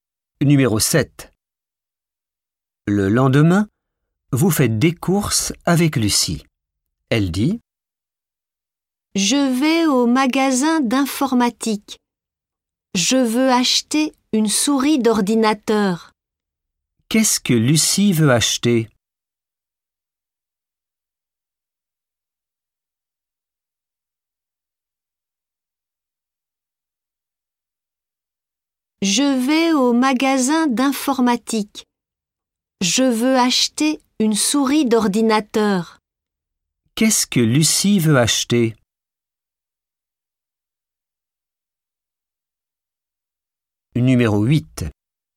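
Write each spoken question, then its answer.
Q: Qu'est-ce que Lucie veut acheter?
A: Une souris d'ordinateur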